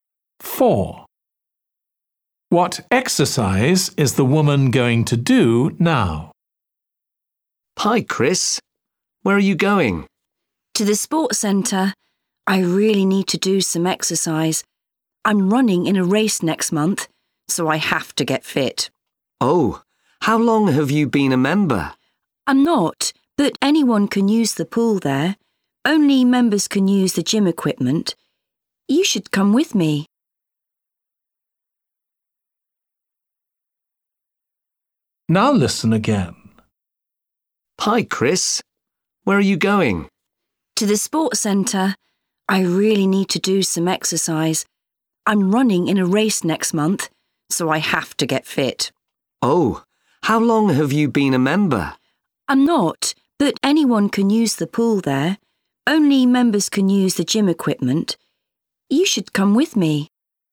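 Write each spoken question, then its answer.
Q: What exercise is the woman going to do now?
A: swimming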